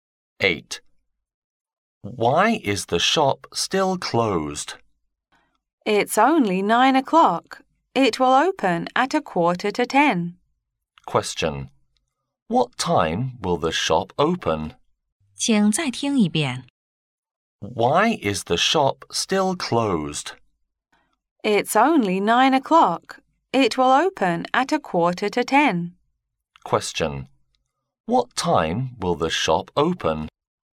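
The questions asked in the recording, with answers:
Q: What time will the shop open?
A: At 9:45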